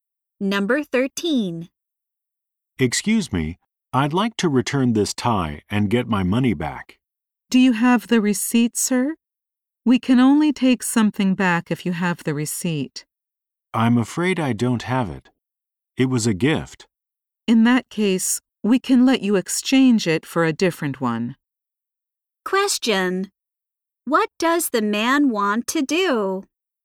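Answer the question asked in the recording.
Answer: Return a tie and get his money back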